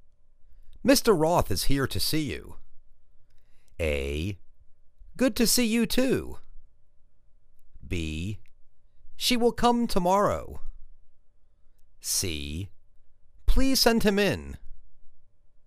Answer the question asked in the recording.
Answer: Please send him in.